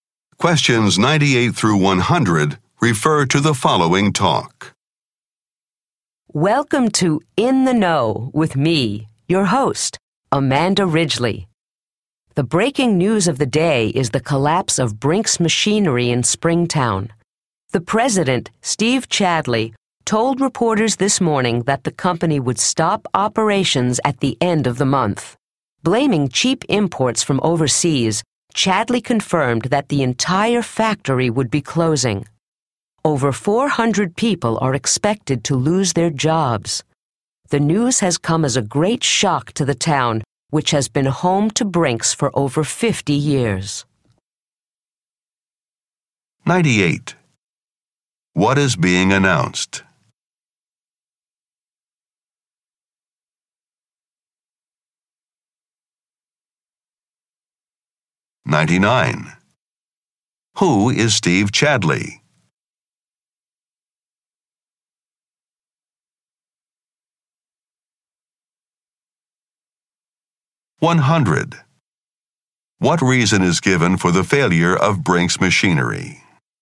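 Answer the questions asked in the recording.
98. The closure of Brinks Machinery
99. The company president
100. Cheap imports from overseas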